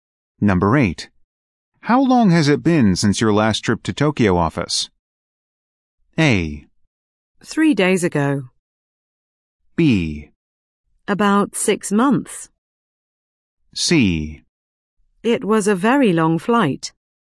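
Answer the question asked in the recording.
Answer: B: About 6 months.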